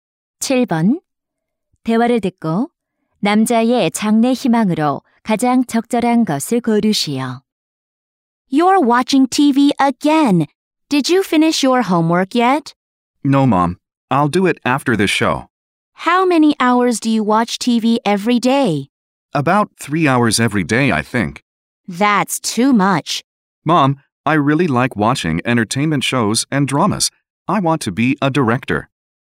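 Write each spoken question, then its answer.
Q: 대화를 듣고 남자의 장래 희망으로 가장 적절한 것을 고르시오.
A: 감독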